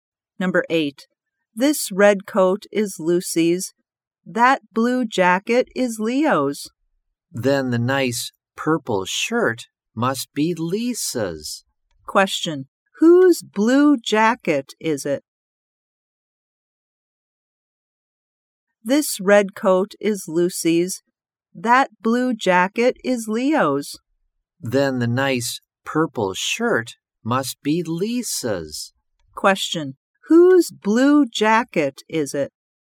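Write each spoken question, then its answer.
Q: Whose blue jacket is it?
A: Leo's.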